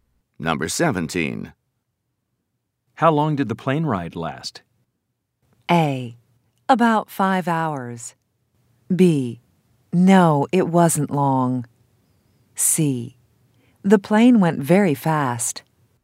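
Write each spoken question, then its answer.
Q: How long did the plane ride last?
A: A: About 5 hours.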